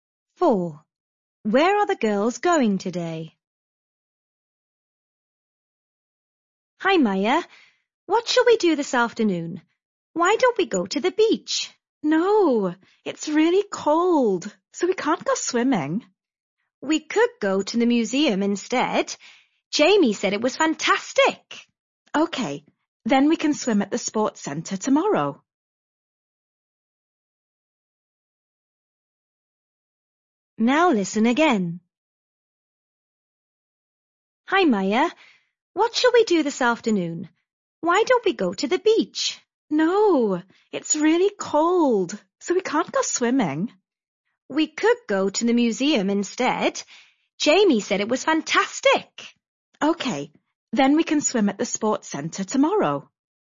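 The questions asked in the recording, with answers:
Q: Where are the girls going today?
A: To the museum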